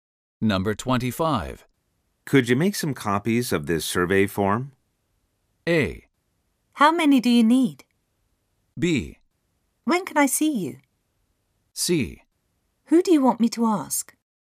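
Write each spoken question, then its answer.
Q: Could you make some copies of this survey form?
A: A: How many do you need?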